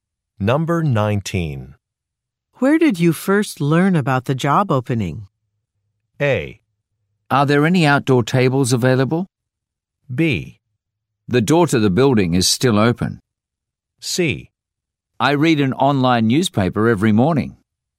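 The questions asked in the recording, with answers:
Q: Where did you first learn about the job opening?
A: C: I read an online newspaper every morning.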